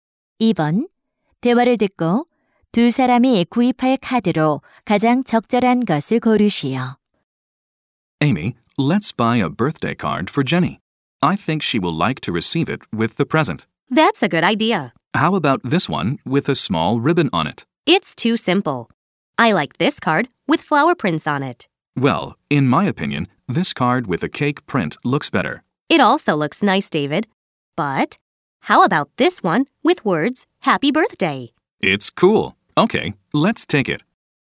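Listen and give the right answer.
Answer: Happy Birthday 글자가 있는 카드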